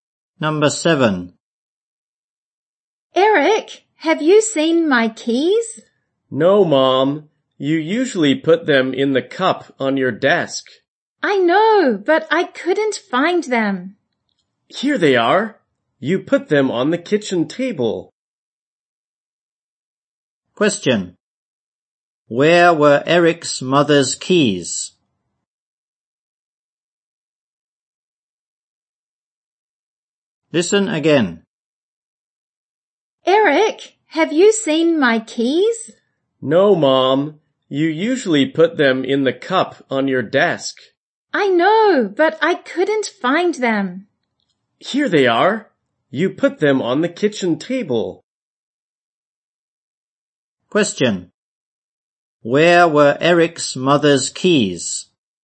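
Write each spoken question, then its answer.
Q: Where were Eric's mother's keys?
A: On the kitchen table.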